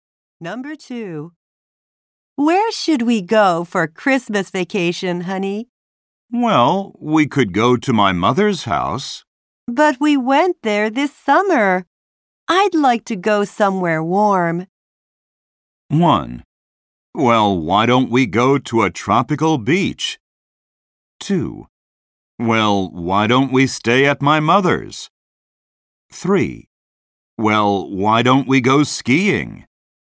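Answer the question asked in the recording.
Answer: 1: Well, why don't we go to a tropical beach?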